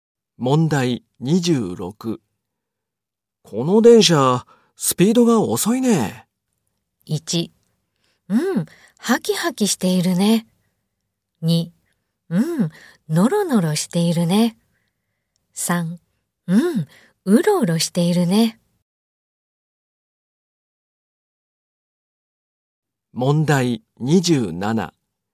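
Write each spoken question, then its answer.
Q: この電車、スピードが遅いね。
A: 2: うん、ノロノロしているね。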